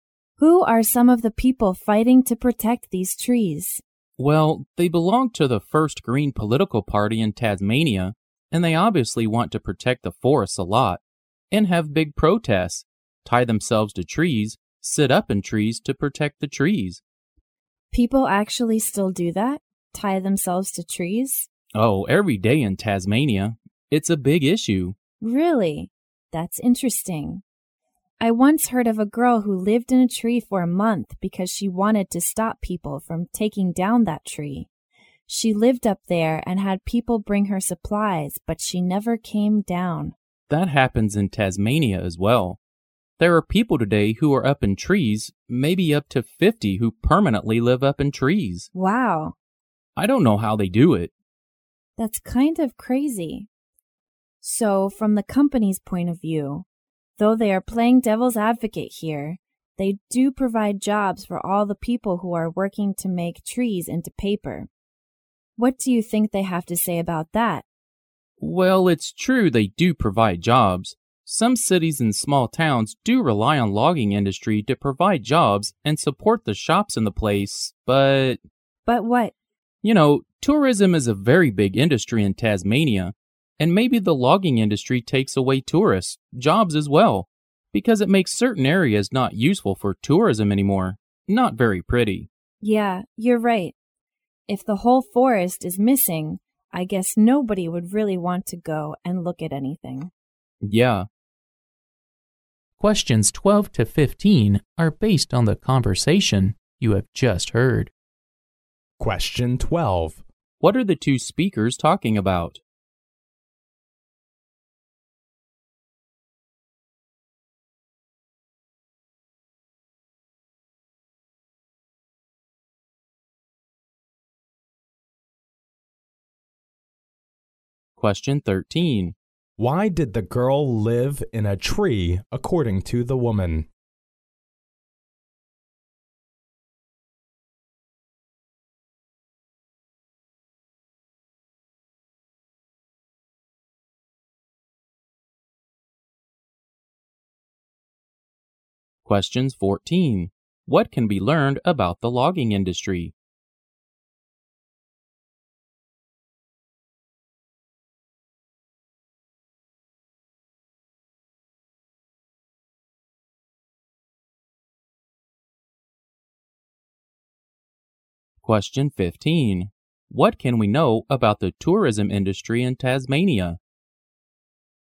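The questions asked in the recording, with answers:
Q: What are the two speakers talking about?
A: Protecting Tasmania's forests from logging

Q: Why did the girl live in a tree according to the woman?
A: To stop people from cutting down that tree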